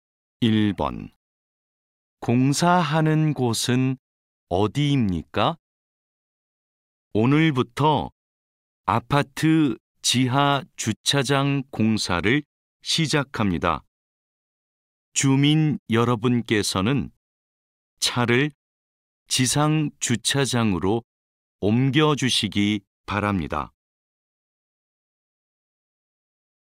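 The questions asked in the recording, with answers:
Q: 공사하는 곳은 어디입니까?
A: 아파트 지하 주차장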